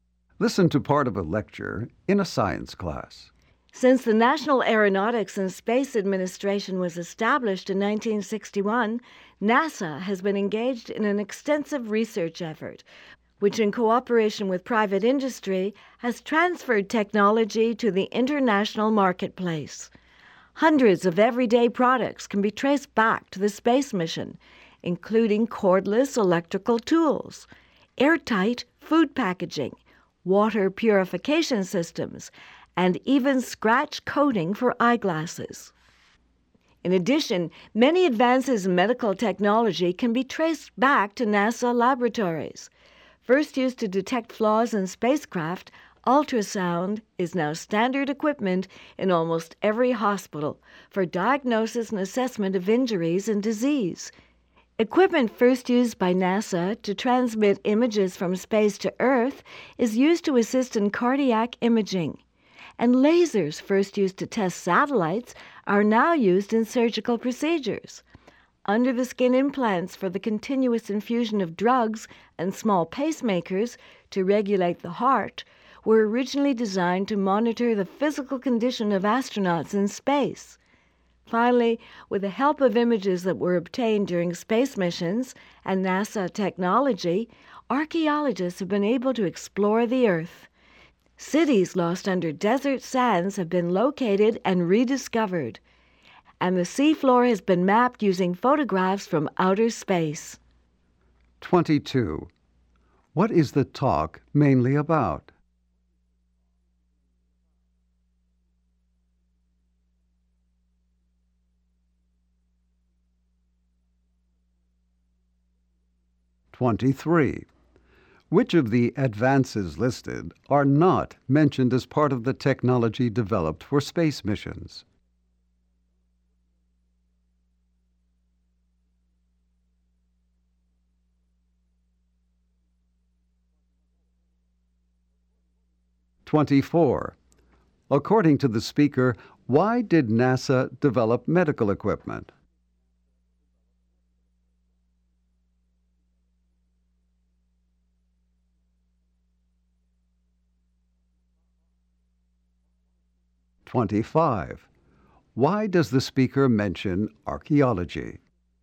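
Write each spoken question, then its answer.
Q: What is the talk mainly about?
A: Everyday and medical products developed from NASA space research

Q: According to the speaker, why did NASA develop medical equipment?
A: To monitor the physical condition of astronauts in space

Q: Why does the speaker mention archaeology?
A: NASA images and technology helped archaeologists explore the Earth and find lost cities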